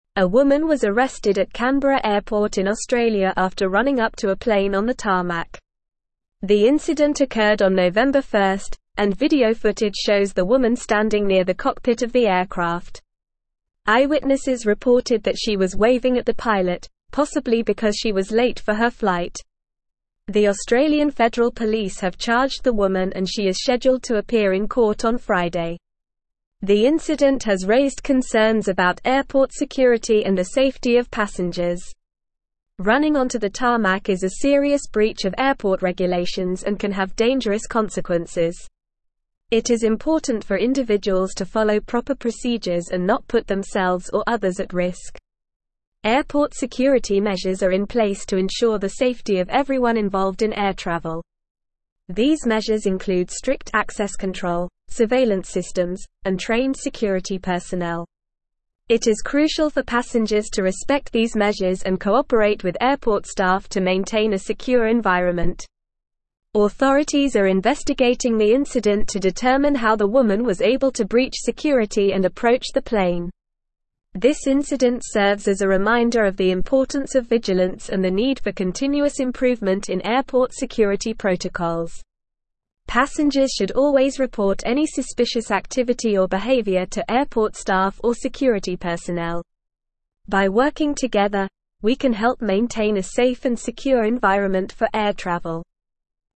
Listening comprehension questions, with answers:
Listen and Fill in the Gaps:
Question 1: A woman was arrested at Canberra (1)______ in (2)______ after running up to a plane on the tarmac.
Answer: airport

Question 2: A woman was arrested at Canberra (1)______ in (2)______ after running up to a plane on the tarmac.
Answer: Australia

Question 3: video footage shows the woman standing near the cockpit of the (3)______.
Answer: aircraft

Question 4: (4)______ reported that she was waving at the pilot, possibly because she was late for her flight.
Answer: Eyewitnesses

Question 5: The Australian Federal Police have charged the woman and she is (5)______ to appear in court on Friday.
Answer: scheduled

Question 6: The (6)______ has (7)______ concerns about airport security and the safety of passengers.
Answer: incident

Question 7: The (6)______ has (7)______ concerns about airport security and the safety of passengers.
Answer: raised

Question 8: It is important for individuals to follow proper procedures and not put themselves or (8)______ at risk.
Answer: others

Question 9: Airport security measures are in (9)______ to ensure the safety of everyone involved in air travel.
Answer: place

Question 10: These measures (10)______ strict access control, surveillance (11)______, and trained security personnel.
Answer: include

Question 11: These measures (10)______ strict access control, surveillance (11)______, and trained security personnel.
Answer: systems

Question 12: (12)______ are investigating the incident to determine how the woman was able to breach security and approach the plane.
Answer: Authorities

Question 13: Passengers should always report any suspicious activity or behavior to airport (13)______ or security personnel.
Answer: staff

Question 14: By (14)______ together, we can help (15)______ a safe and secure environment for air (16)______.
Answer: working

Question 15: By (14)______ together, we can help (15)______ a safe and secure environment for air (16)______.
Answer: maintain

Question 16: By (14)______ together, we can help (15)______ a safe and secure environment for air (16)______.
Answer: travel

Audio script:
A woman was arrested at Canberra airport in Australia after running up to a plane on the tarmac. The incident occurred on November 1st, and video footage shows the woman standing near the cockpit of the aircraft. Eyewitnesses reported that she was waving at the pilot, possibly because she was late for her flight. The Australian Federal Police have charged the woman and she is scheduled to appear in court on Friday.
The incident has raised concerns about airport security and the safety of passengers. Running onto the tarmac is a serious breach of airport regulations and can have dangerous consequences. It is important for individuals to follow proper procedures and not put themselves or others at risk.
Airport security measures are in place to ensure the safety of everyone involved in air travel. These measures include strict access control, surveillance systems, and trained security personnel. It is crucial for passengers to respect these measures and cooperate with airport staff to maintain a secure environment.
Authorities are investigating the incident to determine how the woman was able to breach security and approach the plane. This incident serves as a reminder of the importance of vigilance and the need for continuous improvement in airport security protocols.
Passengers should always report any suspicious activity or behavior to airport staff or security personnel. By working together, we can help maintain a safe and secure environment for air travel.

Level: Level 4